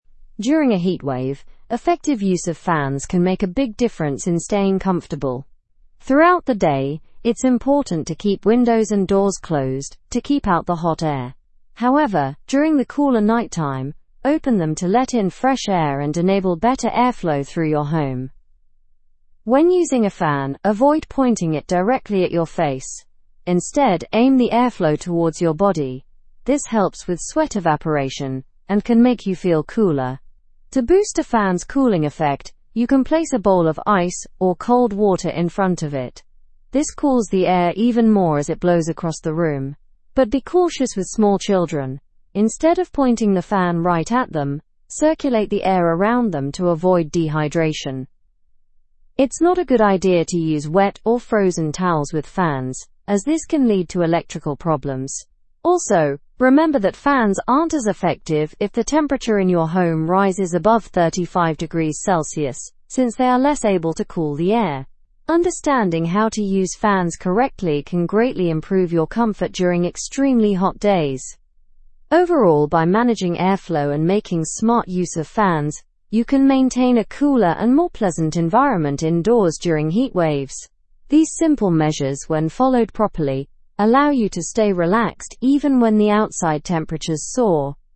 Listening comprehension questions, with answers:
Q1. What should be done with windows during the day to keep out hot air?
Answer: Keep them closed.

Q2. When should the windows be opened to increase airflow?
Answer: At night.

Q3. How should a fan be aimed for proper cooling?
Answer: Direct the airflow toward your body.

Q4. What can enhance a fan's cooling ability?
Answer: Putting a bowl of ice or cold water in front of it.

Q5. Why shouldn't fans be directed at young children?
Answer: Because it may cause dehydration.

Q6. What happens to a fan's effectiveness if temperatures go above 35°C?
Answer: Its effectiveness decreases.

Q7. Why is it unsafe to use wet towels on fans?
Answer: It can lead to electrical issues.

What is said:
During a heatwave, effective use of fans can make a big difference in staying comfortable. Throughout the day, it's important to keep windows and doors closed to keep out the hot air. However, during the cooler nighttime, open them to let in fresh air and enable better airflow through your home.
When using a fan, avoid pointing it directly at your face; instead, aim the airflow towards your body. This helps with sweat evaporation and can make you feel cooler. To boost a fan's cooling effect, you can place a bowl of ice or cold water in front of it. This cools the air even more as it blows across the room. But be cautious with small children; instead of pointing the fan right at them, circulate the air around them to avoid dehydration.
It's not a good idea to use wet or frozen towels with fans, as this can lead to electrical problems. Also, remember that fans aren't as effective if the temperature in your home rises above 35°C since they are less able to cool the air. Understanding how to use fans correctly can greatly improve your comfort during extremely hot days.
Overall, by managing airflow and making smart use of fans, you can maintain a cooler and more pleasant environment indoors during heatwaves. These simple measures, when followed properly, allow you to stay relaxed even when the outside temperatures soar.

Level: (Level 3)